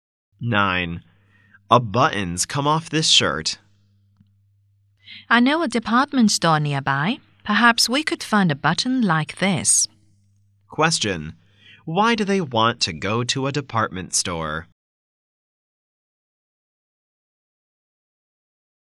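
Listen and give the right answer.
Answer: To find a button to replace the lost one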